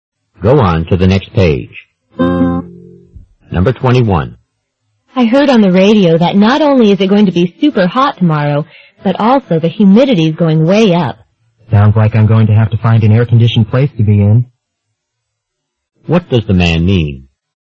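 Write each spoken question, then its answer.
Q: What does the man mean?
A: He will need to stay somewhere air-conditioned tomorrow.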